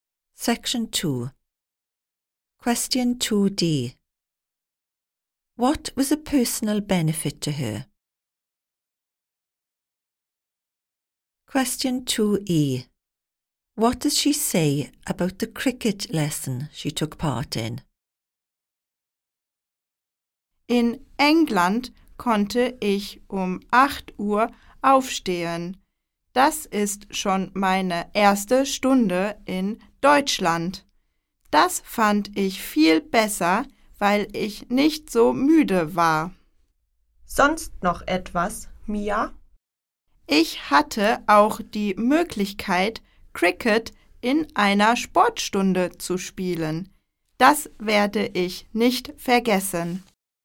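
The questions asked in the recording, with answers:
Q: What was a personal benefit to her?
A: She could get up at 8 so she wasn't so tired

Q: What does she say about the cricket lesson she took part in?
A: She will never forget it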